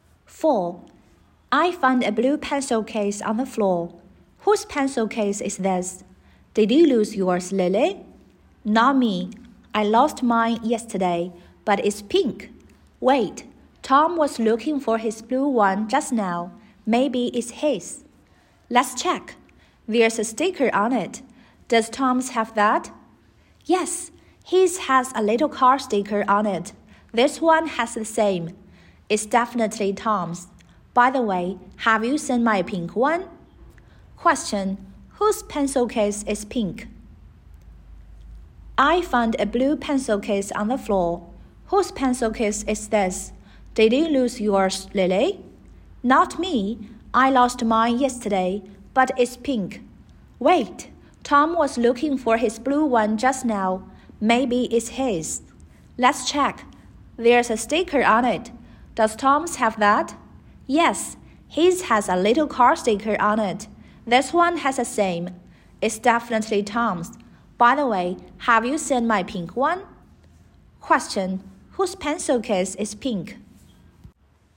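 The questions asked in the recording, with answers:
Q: Question, whose pencil case is pink?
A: Lily's.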